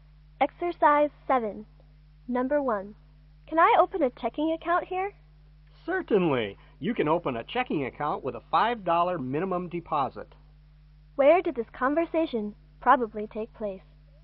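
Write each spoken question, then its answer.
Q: Where did this conversation probably take place?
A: At a bank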